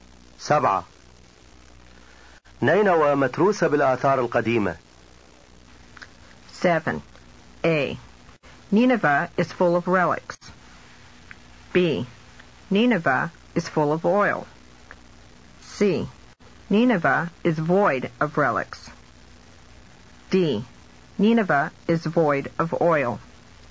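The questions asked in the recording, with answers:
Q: نينوى متروسة بالآثار القديمة.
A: A: Nineveh is full of relics.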